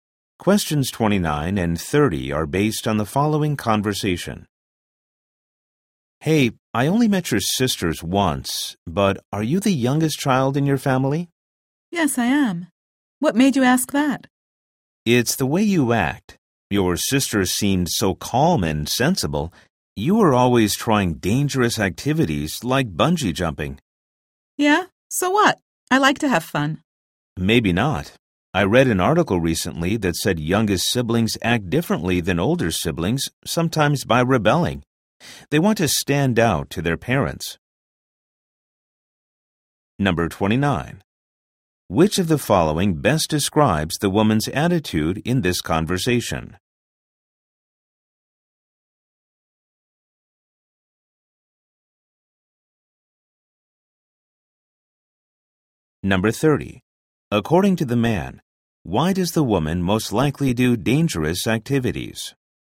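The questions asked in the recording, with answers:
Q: According to the man, why does the woman most likely do dangerous activities?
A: To stand out to her parents as the youngest sibling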